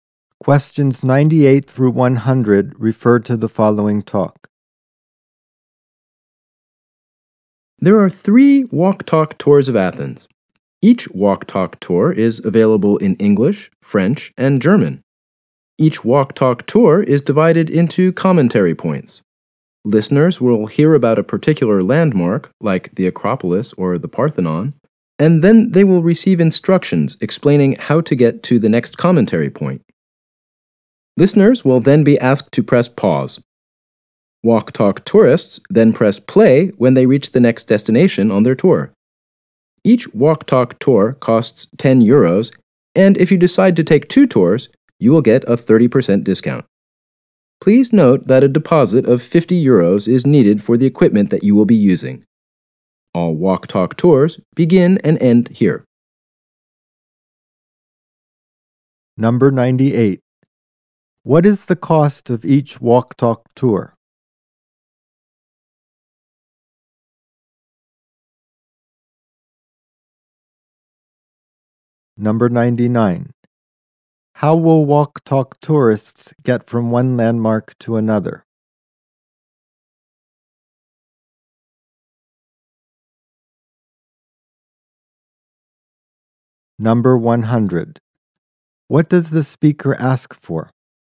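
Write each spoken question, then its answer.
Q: What is the cost of each walk-talk tour?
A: 10 euros

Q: How will walk-talk tourists get from one landmark to another?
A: By following recorded instructions

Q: What does the speaker ask for?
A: A 50-euro deposit for the equipment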